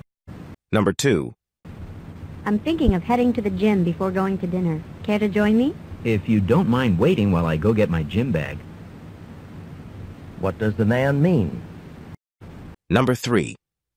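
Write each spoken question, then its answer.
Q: What does the man mean?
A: He'll go to the gym with her if she waits while he gets his gym bag.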